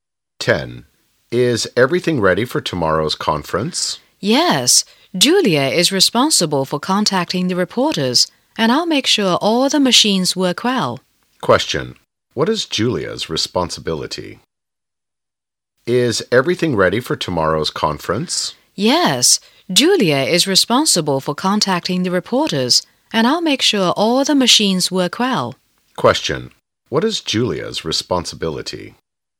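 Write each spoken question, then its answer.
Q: What is Julia's responsibility?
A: Contacting the reporters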